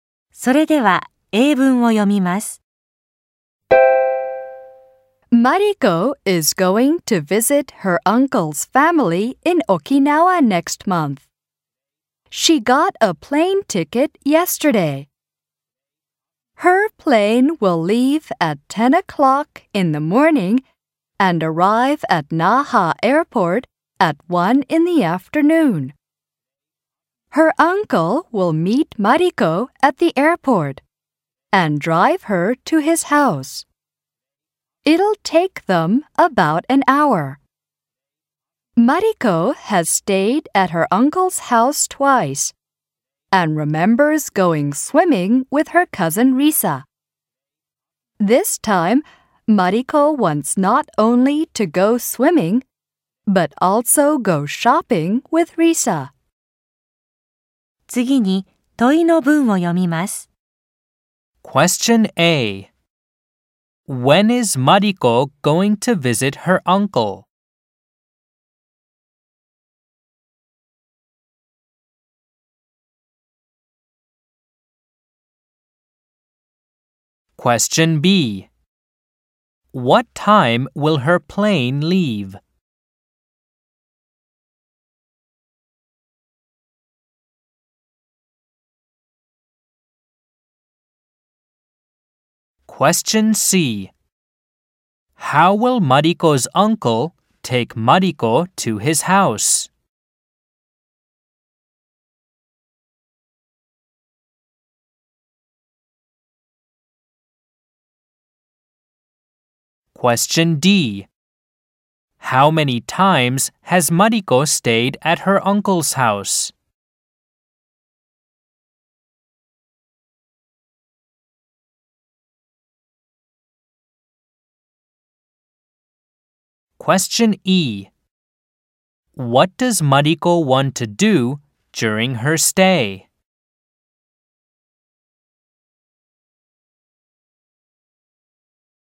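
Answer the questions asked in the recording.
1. Next month
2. At 10 o'clock in the morning
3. By car
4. Twice
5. Go swimming and go shopping with Risa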